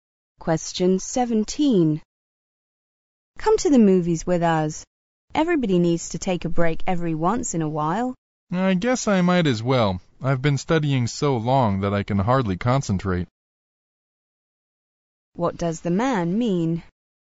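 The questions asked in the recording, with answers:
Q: What does the man mean?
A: He will go to the movies and take a break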